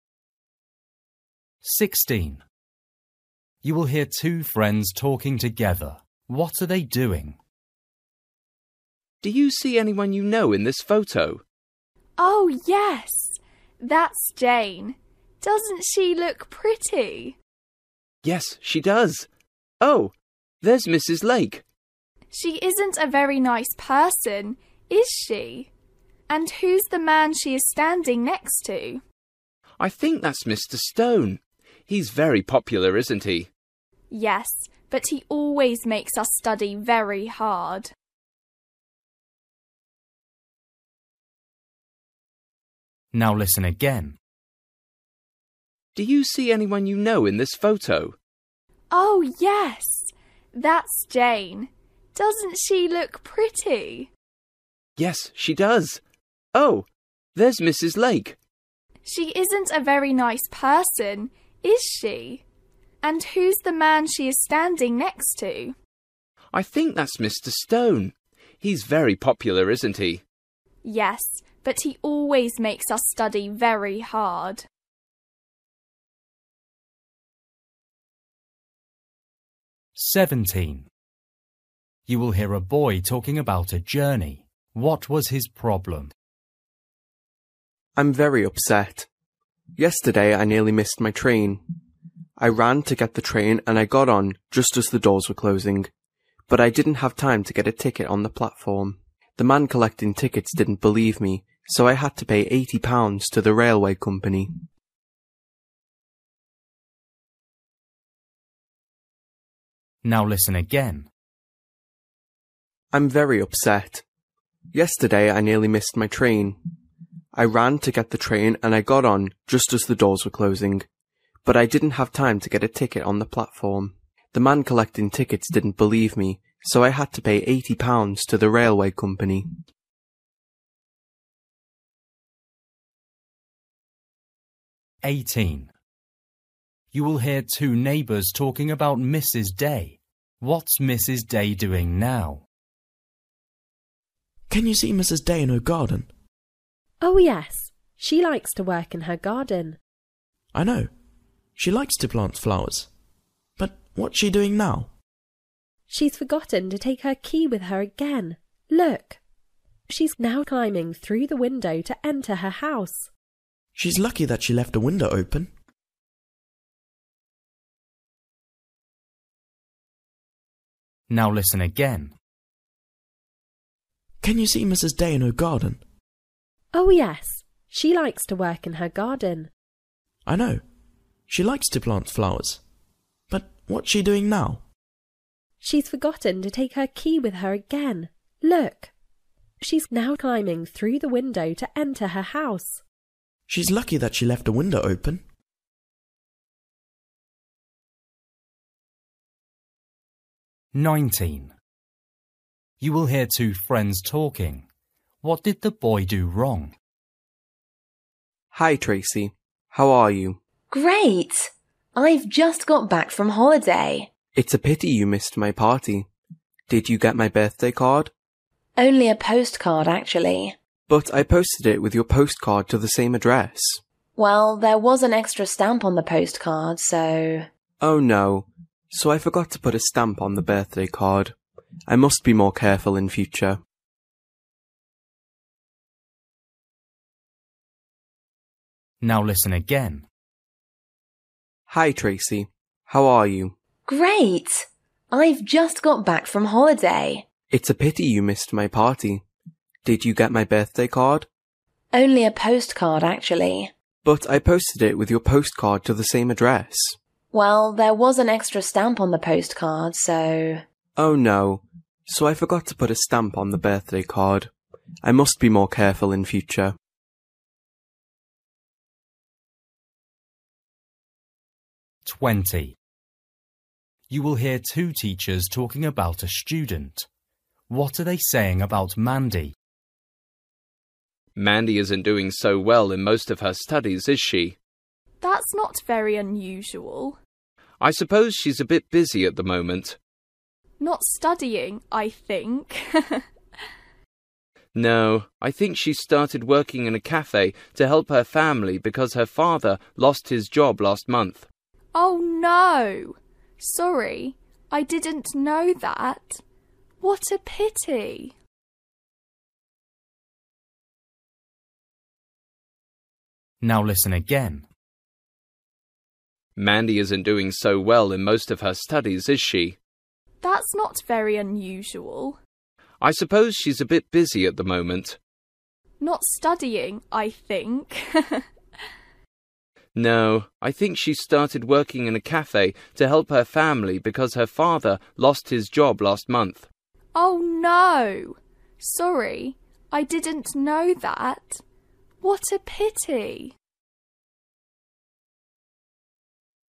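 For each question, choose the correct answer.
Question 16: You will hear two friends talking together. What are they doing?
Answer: looking at a photo

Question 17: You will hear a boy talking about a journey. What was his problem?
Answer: he had no ticket and had to pay £80

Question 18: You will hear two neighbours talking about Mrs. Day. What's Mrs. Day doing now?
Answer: climbing through the window into her house

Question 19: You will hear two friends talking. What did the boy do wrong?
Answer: he forgot to put a stamp on the birthday card

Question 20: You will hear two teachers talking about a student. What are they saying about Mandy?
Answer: she is working in a cafe to help her family

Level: Luyện nghe trình độ A2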